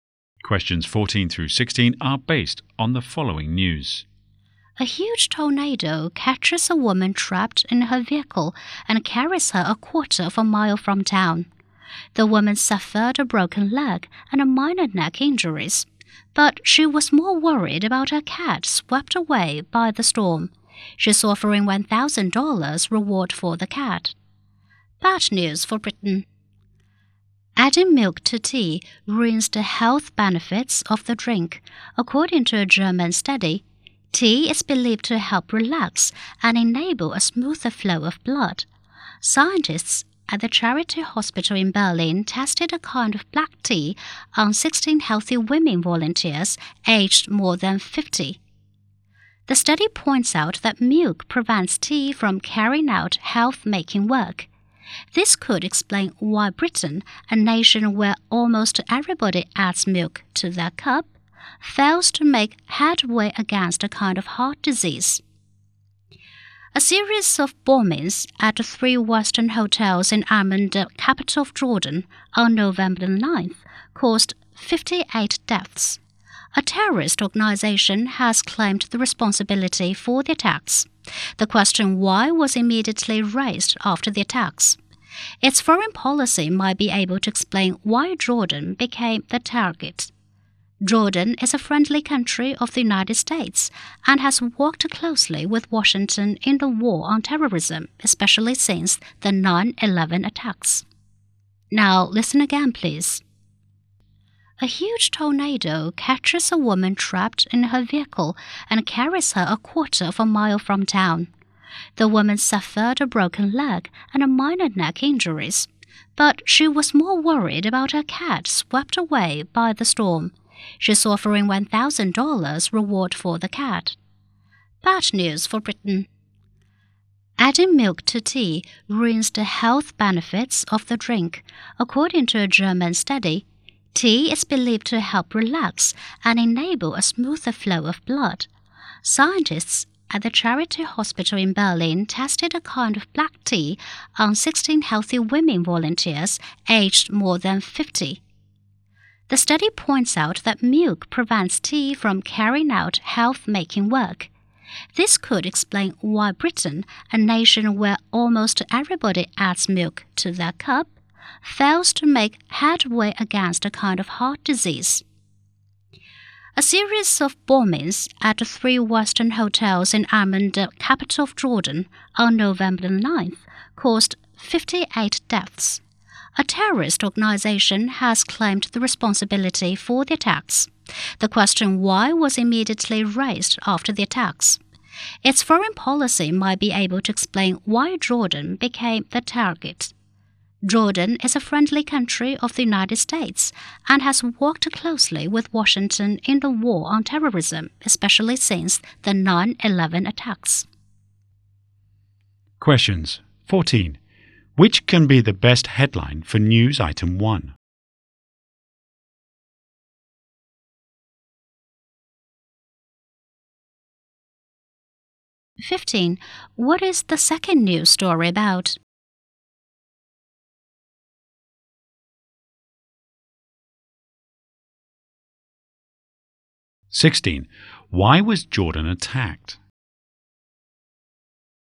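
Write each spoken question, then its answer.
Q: What is the second news story about?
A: Adding milk to tea ruins its health benefits

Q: Why was Jordan attacked?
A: Because of its foreign policy, being a close ally of the US in the war on terrorism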